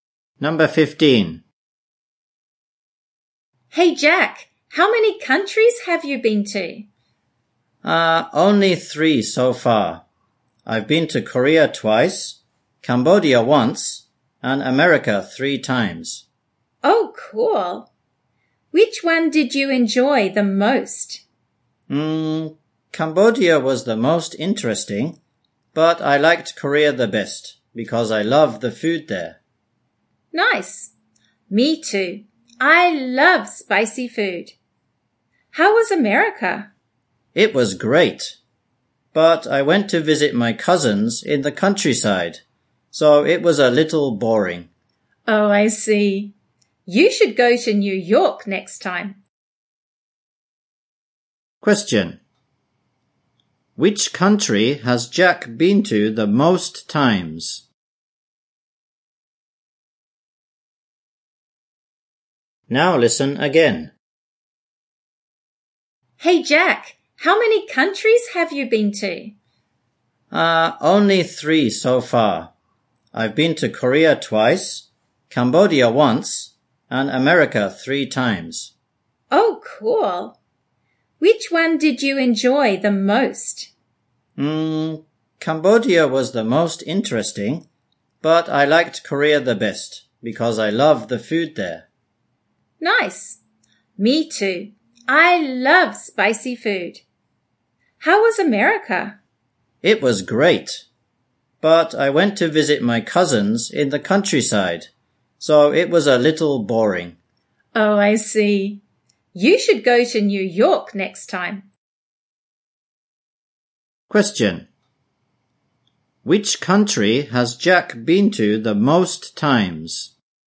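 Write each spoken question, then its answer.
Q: Which country has Jack been to the most times?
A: America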